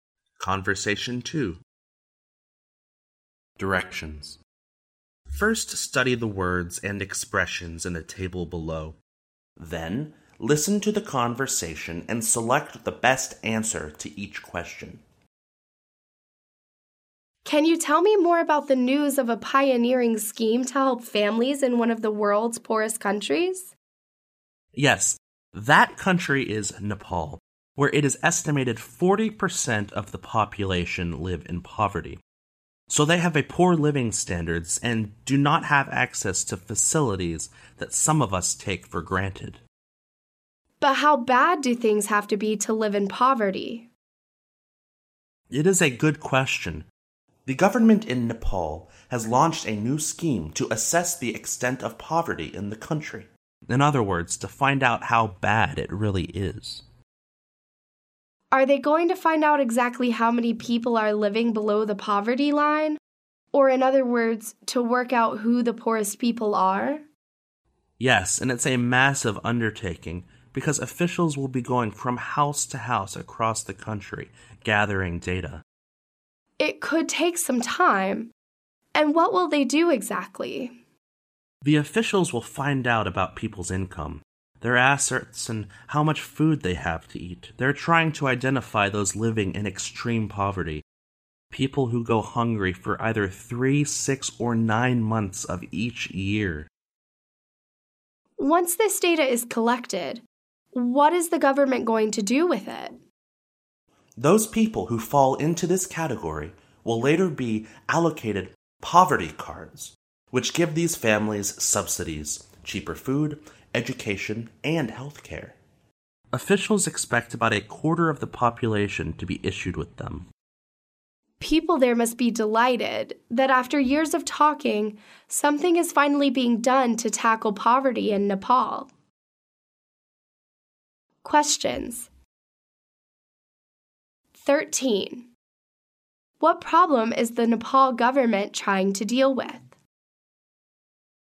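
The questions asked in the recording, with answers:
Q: What problem is the Nepal government trying to deal with?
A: Poverty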